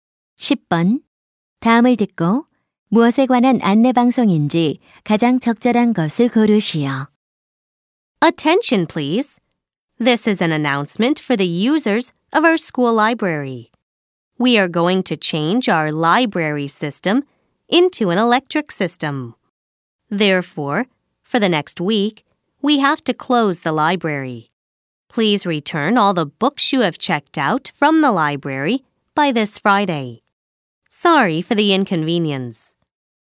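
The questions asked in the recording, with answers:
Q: 다음을 듣고 무엇에 관한 안내 방송인지 가장 적절한 것을 고르시오.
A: 학교 도서관 임시 휴관 및 도서 반납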